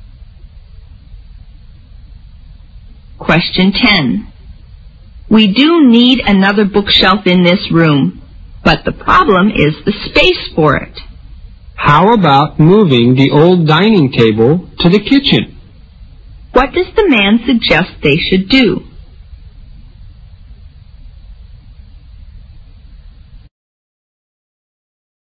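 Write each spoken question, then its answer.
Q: What does the man suggest they should do?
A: Move the old dining table to the kitchen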